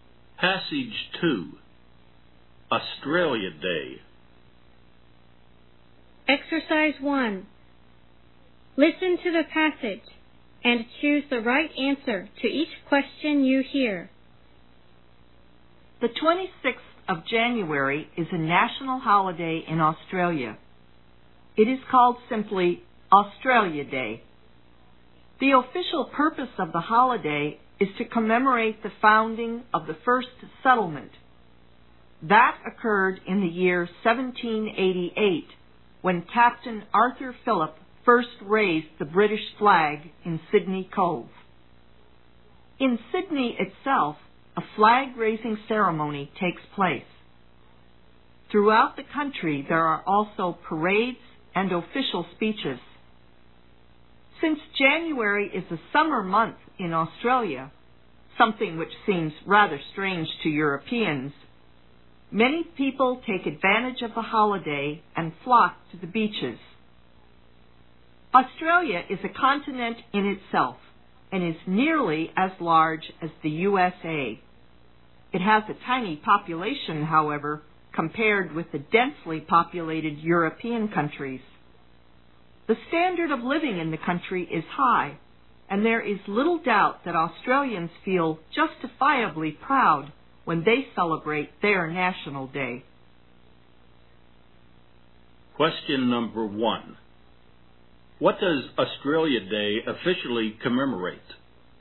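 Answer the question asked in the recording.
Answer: The founding of the first settlement in 1788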